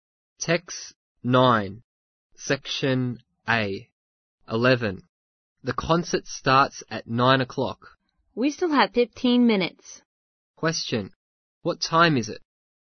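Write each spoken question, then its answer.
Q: Question, what time is it?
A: 8:45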